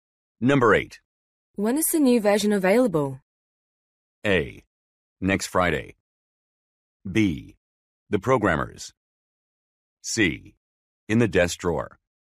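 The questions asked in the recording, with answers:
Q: When is the new version available?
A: A: Next Friday.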